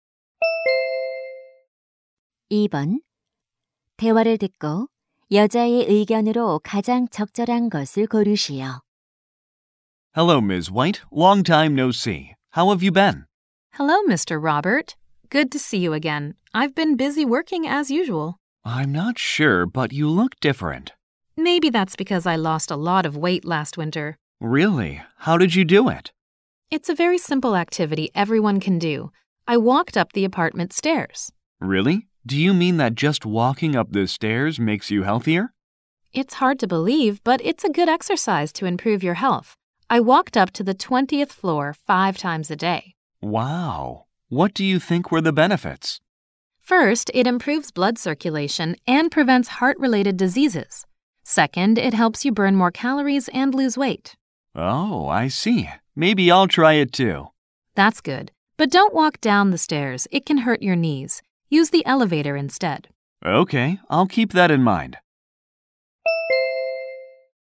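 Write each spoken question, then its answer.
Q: 대화를 듣고 여자의 의견으로 가장 적절한 것을 고르시오.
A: 계단 오르기는 건강에 좋은 운동이다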